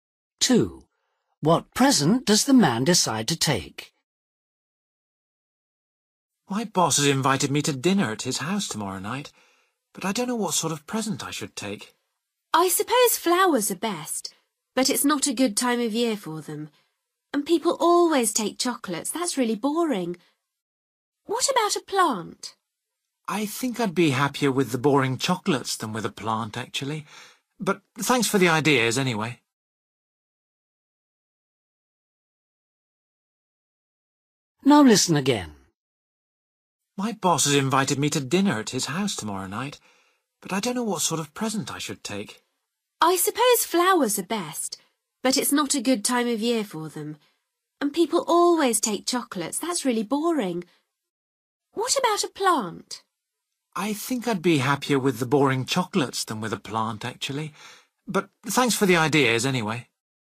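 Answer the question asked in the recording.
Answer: Chocolates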